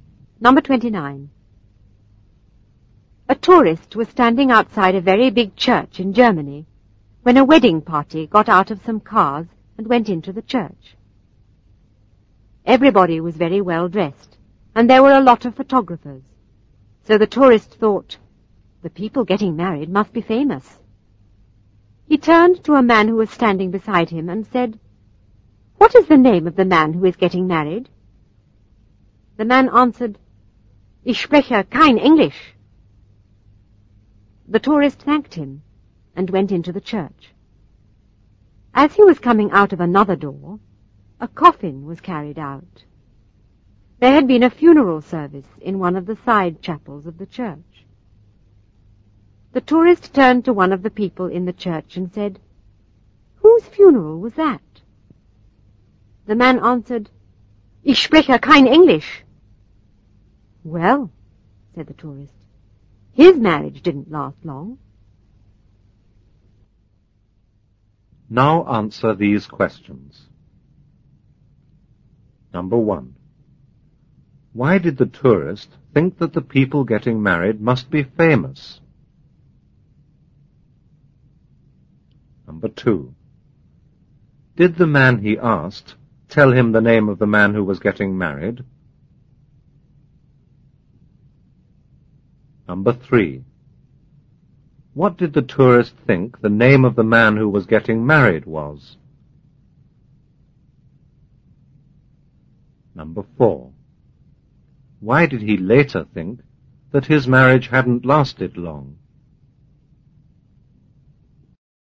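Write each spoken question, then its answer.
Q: Why did the tourist think that the people getting married must be famous?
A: Because everybody was very well dressed and there were a lot of photographers.

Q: Did the man he asked tell him the name of the man who was getting married?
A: No, he said he didn't speak English.

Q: What did the tourist think the name of the man who was getting married was?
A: Ich spreche kein Englisch.

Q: Why did he later think that his marriage hadn't lasted long?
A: Because he was told the dead man's name was also "Ich spreche kein Englisch", so he thought the groom had died.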